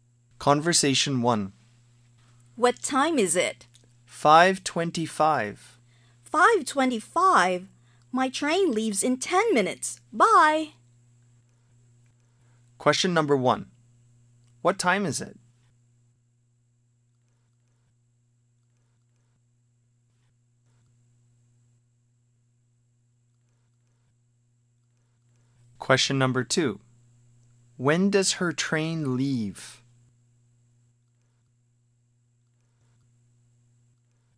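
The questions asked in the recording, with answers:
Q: What time is it?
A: 5:25

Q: When does her train leave?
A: In 10 minutes (5:35)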